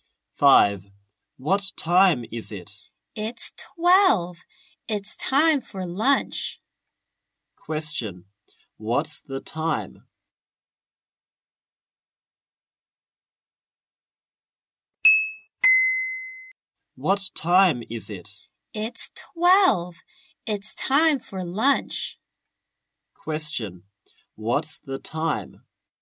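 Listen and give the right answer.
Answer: 12 o'clock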